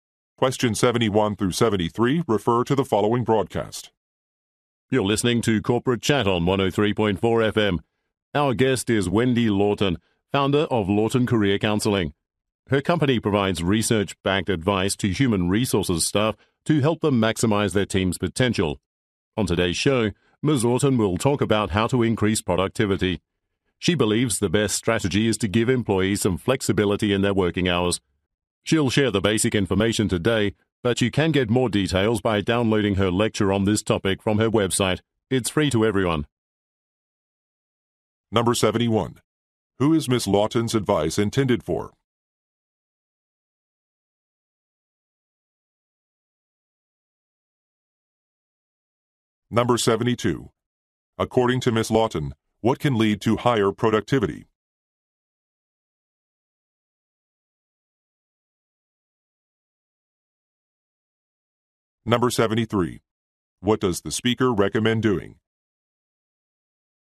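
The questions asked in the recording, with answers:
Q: Who is Ms. Lawton's advice intended for?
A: Human resources staff

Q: According to Ms. Lawton, what can lead to higher productivity?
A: Flexible working hours

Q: What does the speaker recommend doing?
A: Downloading Ms. Lawton's lecture from her website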